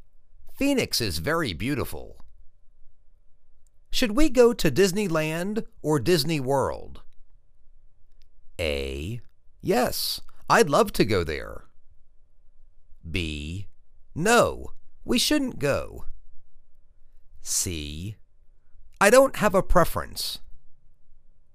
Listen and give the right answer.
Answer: I don't have a preference.